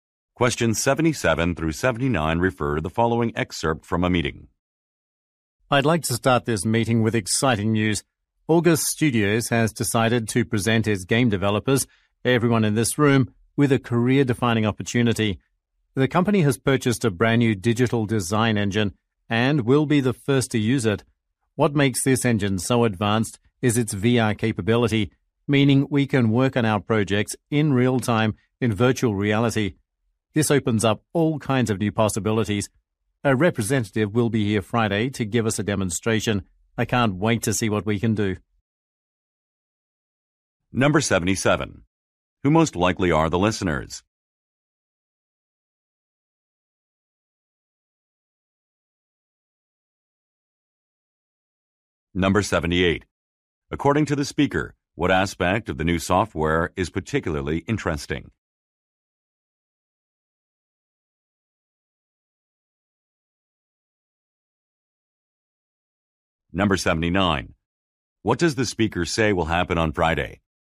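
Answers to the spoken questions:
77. Game developers
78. Its VR capability
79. A representative will give a demonstration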